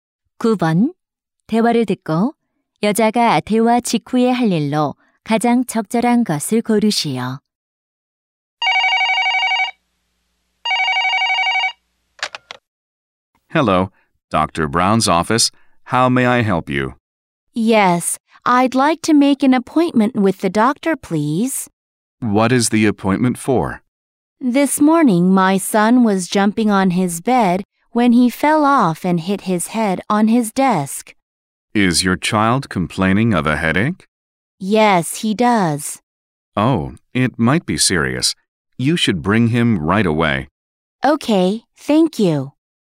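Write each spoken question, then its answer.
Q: 대화를 듣고 여자가 대화 직후에 할 일로 가장 적절한 것을 고르시오.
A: 아들을 데리고 병원에 가기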